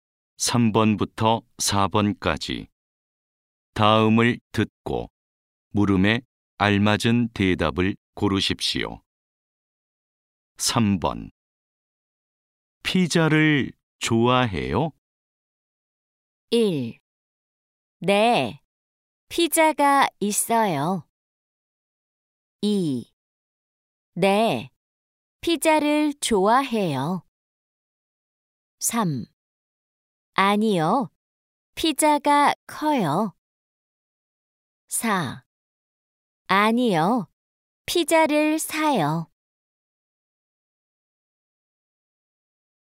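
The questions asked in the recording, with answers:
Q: 피자를 좋아해요?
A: 2: 네, 피자를 좋아해요.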